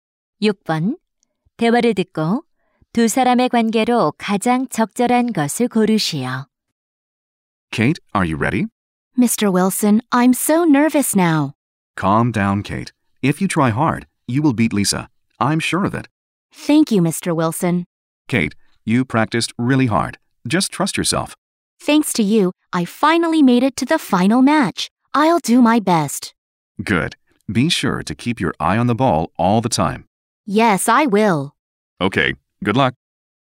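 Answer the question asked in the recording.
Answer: 코치와 선수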